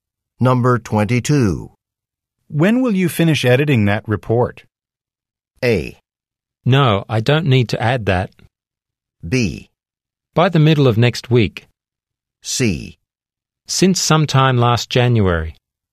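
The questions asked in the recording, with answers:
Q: When will you finish editing that report?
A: B: By the middle of next week.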